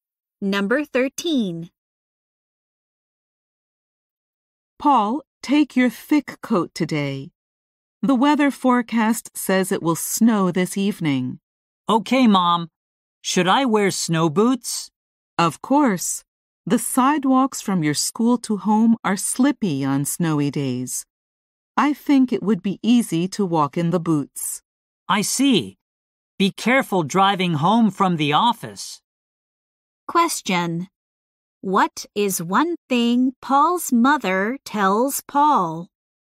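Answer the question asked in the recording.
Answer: To take his thick coat and wear snow boots.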